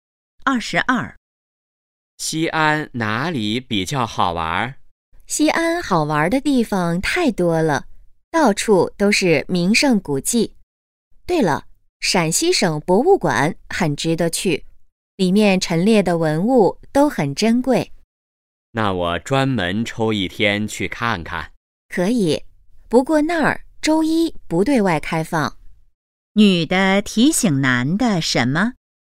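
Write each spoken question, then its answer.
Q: 女的提醒男的什么?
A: 博物馆周一不开放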